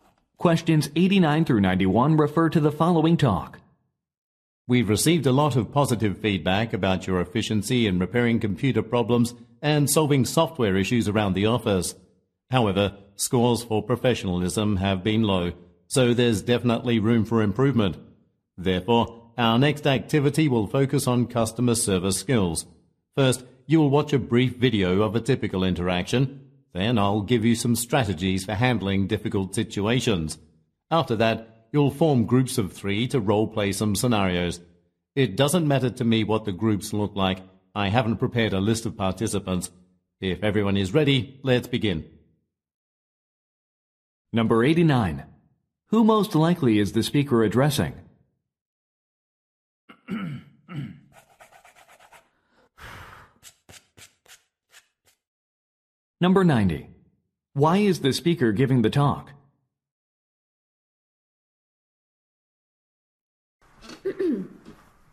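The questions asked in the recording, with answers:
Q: Who most likely is the speaker addressing?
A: IT support staff

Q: Why is the speaker giving the talk?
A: To improve customer service skills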